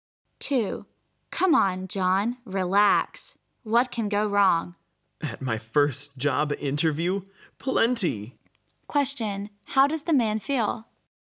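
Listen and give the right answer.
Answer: Nervous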